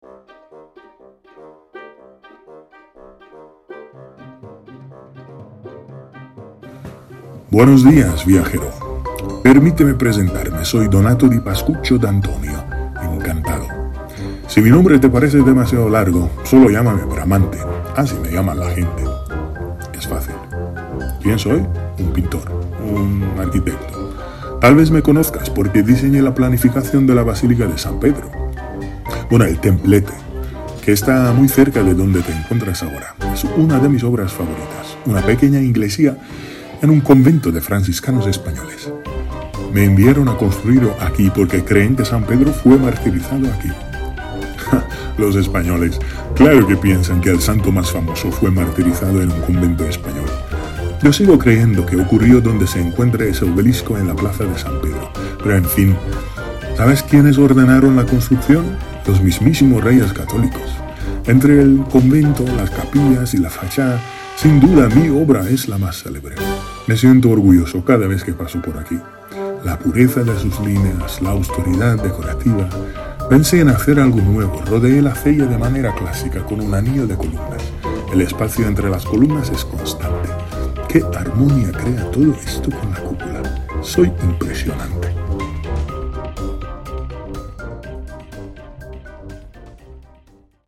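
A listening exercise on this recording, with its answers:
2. ¿Quién diseñó el templete en el San Pietro in Montorio?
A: Bramante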